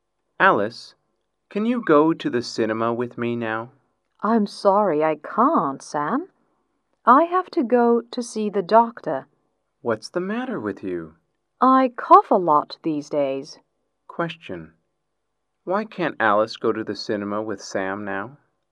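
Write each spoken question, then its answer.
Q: Why can't Alice go to the cinema with Sam now?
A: She has to go to see the doctor because she coughs a lot.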